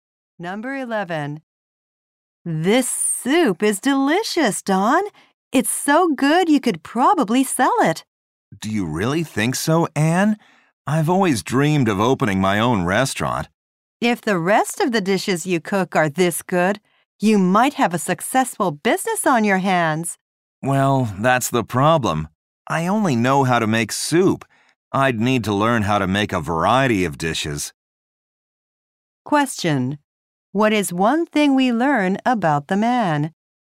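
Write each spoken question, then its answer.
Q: What is one thing we learn about the man?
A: He only knows how to make soup.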